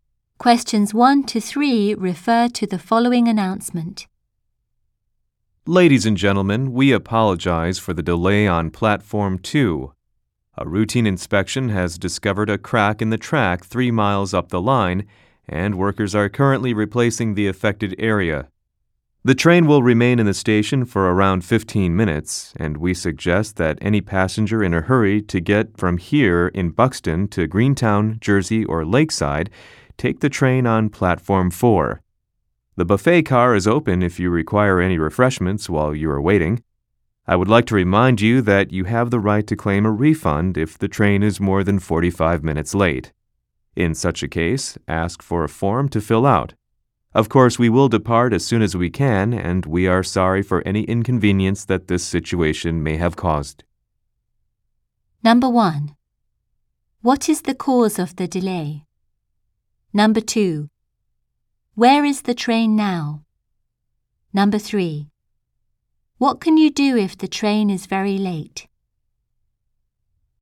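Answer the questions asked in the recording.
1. A crack in the track is being repaired
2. In the station at Buxton, Platform 2
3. Claim a refund by filling out a form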